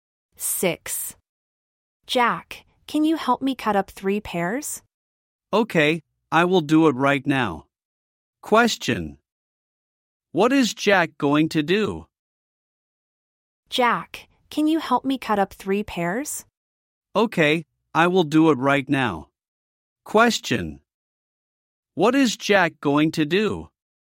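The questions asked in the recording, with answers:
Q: What is Jack going to do?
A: Cut up 3 pears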